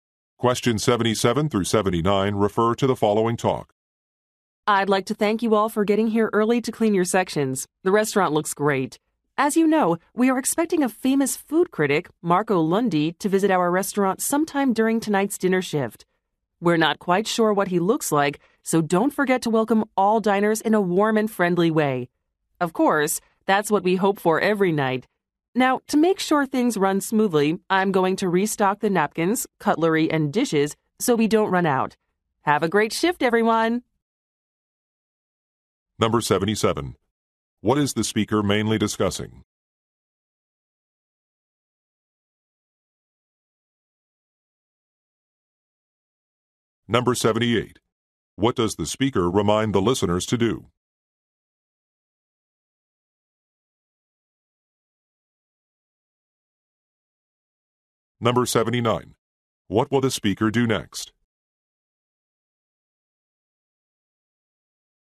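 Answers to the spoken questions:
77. A food critic's visit to the restaurant
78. Welcome all diners warmly
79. Restock napkins, cutlery and dishes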